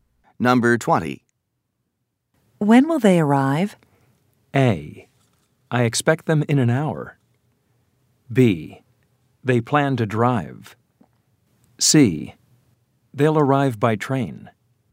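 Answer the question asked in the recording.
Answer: A: I expect them in an hour.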